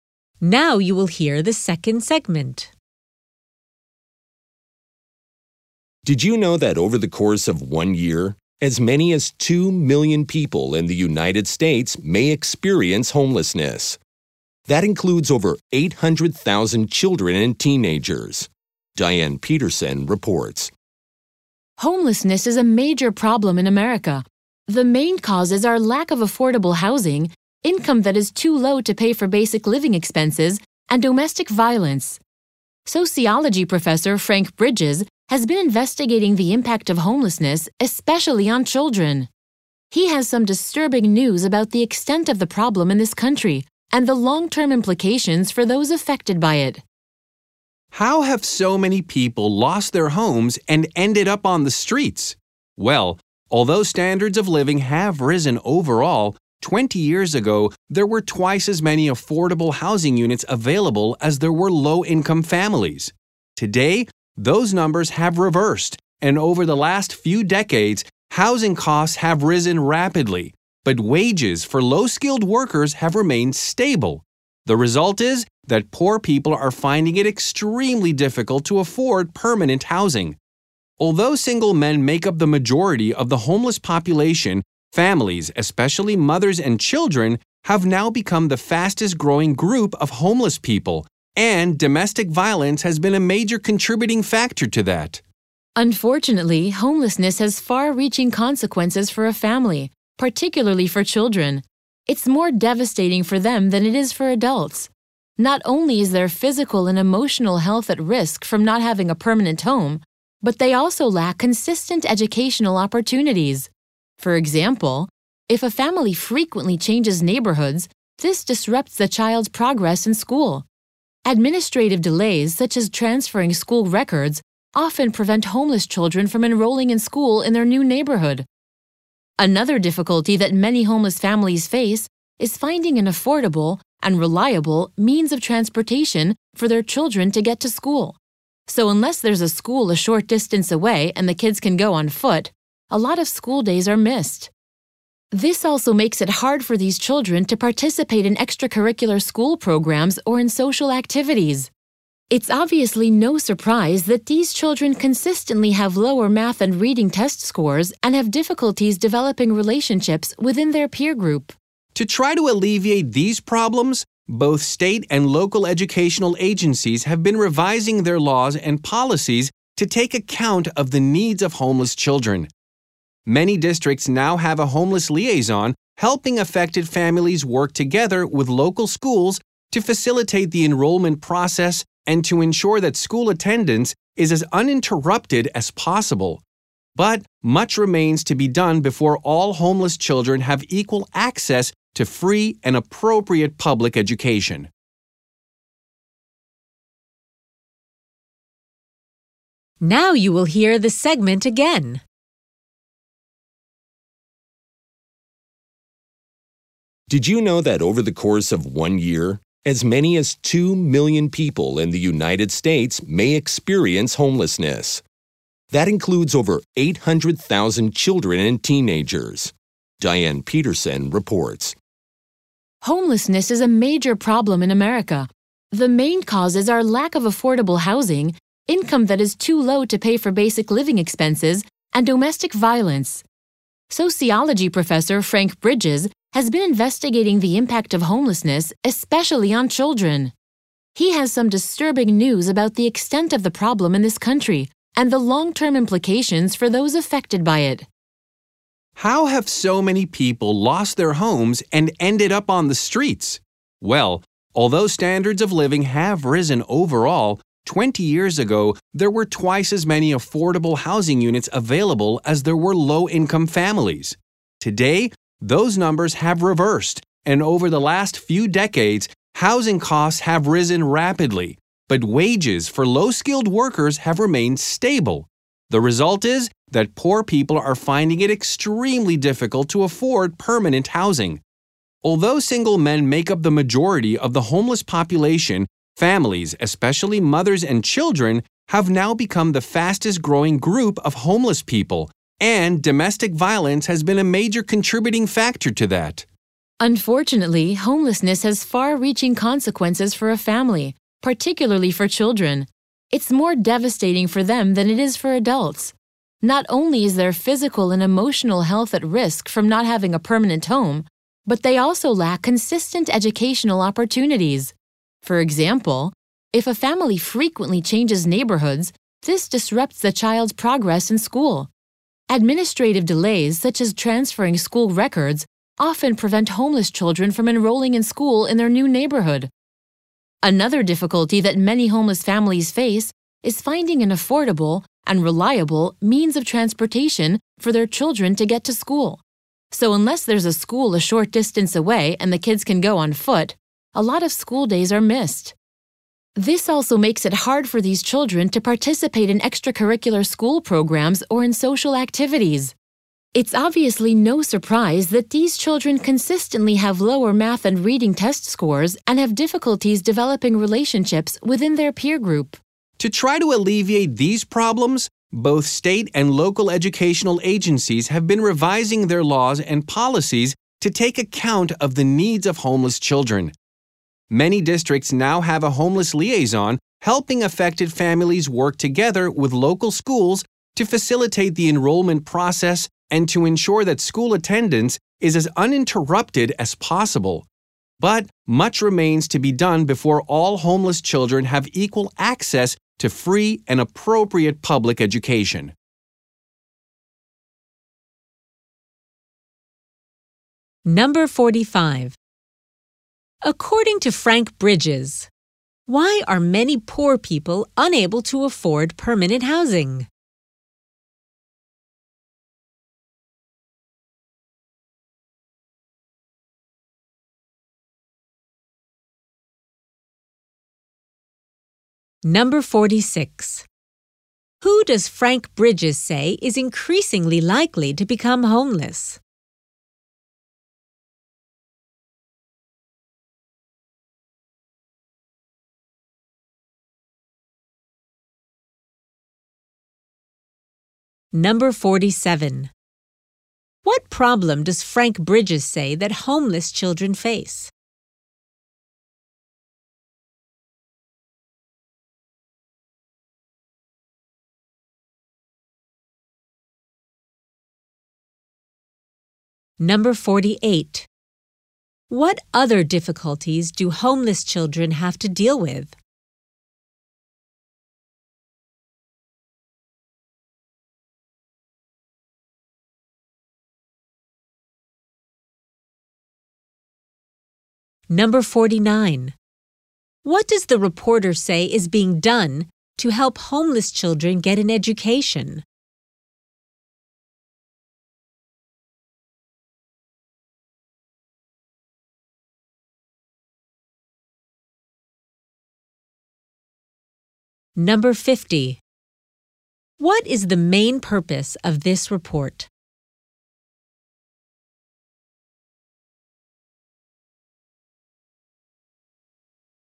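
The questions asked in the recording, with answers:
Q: According to Frank Bridges, why are many poor people unable to afford permanent housing?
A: Housing costs have risen rapidly while wages for low-skilled workers have stayed the same

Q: Who does Frank Bridges say is increasingly likely to become homeless?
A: Families, especially mothers and children

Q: What does the reporter say is being done to help homeless children get an education?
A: Laws and policies are being revised, and homeless liaisons help families with school enrollment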